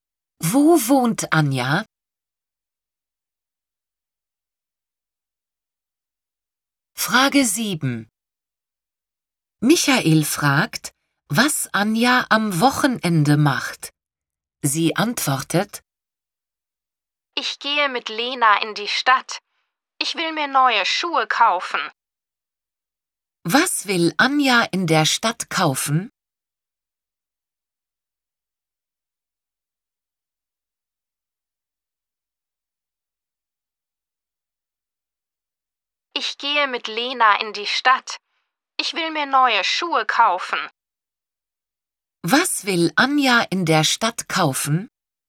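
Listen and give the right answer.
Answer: Neue Schuhe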